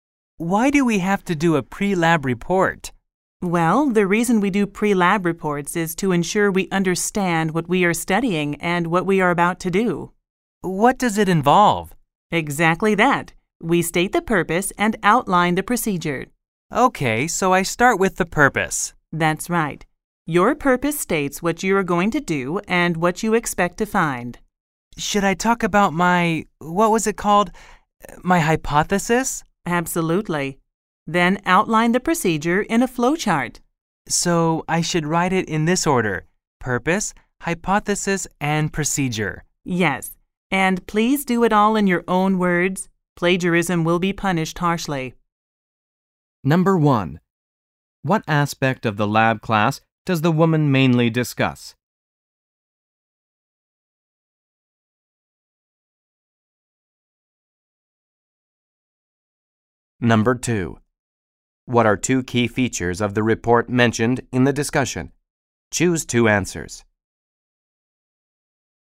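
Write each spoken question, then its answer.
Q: What aspect of the lab class does the woman mainly discuss?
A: The pre-lab report

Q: According to the woman, what will be punished harshly?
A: Plagiarism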